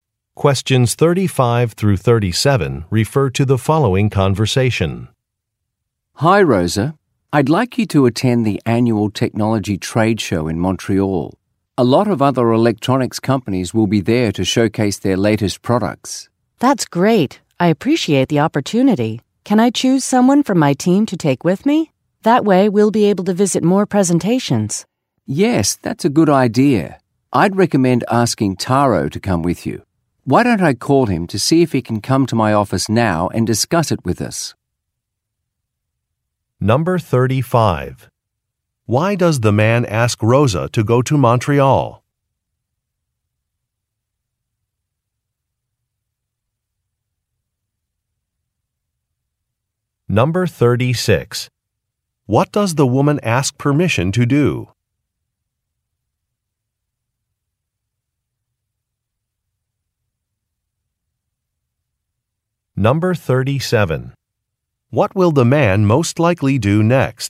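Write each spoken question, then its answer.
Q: Why does the man ask Rosa to go to Montreal?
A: To attend an annual technology trade show

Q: What does the woman ask permission to do?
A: Bring someone from her team with her

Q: What will the man most likely do next?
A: Call Taro to his office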